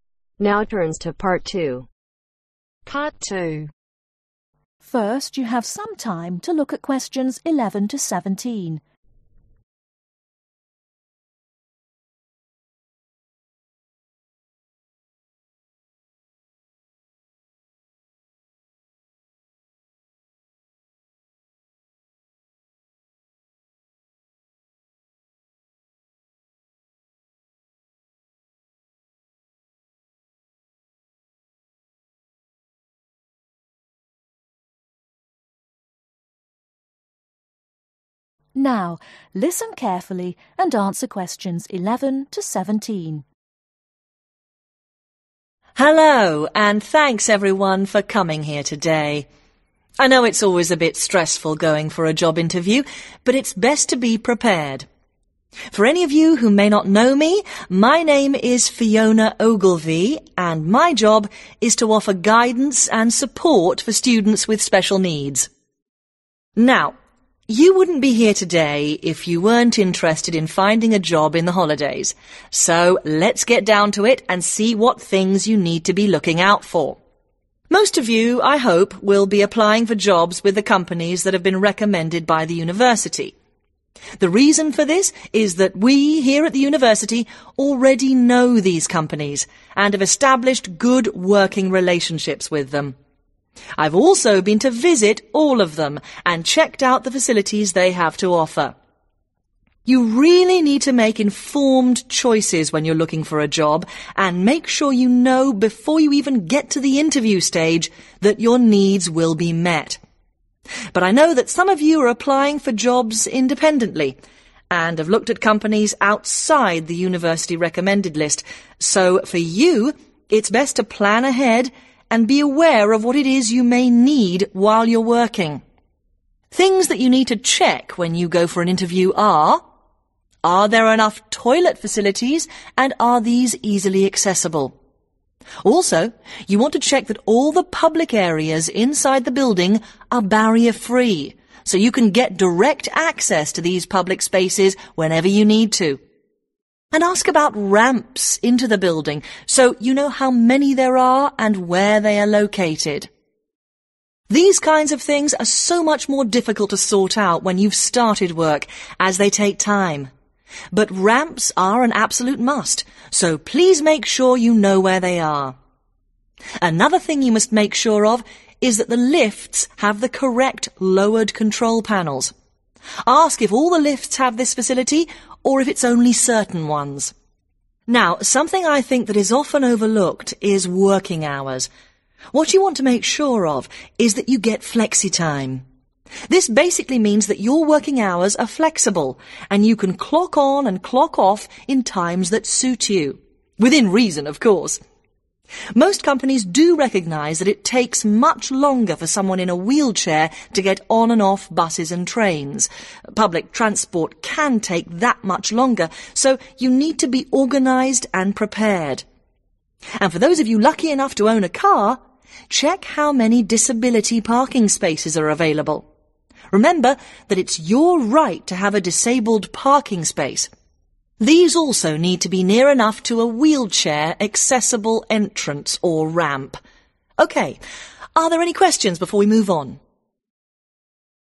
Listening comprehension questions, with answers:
Listen and answer these questions. Use NO MORE THAN TWO WORDS for each answer.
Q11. What kinds of jobs are the students interested in ?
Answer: Holiday Jobs

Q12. What should students make before applying for a job ?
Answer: Informed Choices

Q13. Students that are applying for jobs independently need to ............ .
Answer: Plan ahead

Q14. ............ in buildings must be barrier free for direct access.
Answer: Public areas/Public Spaces

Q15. The location of ............ in the buildings is extremely important.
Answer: Ramps

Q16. Students must ensure they get ............ working hours.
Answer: Flexible

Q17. Car owners need to check the availability of ............ .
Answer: Disabled Parking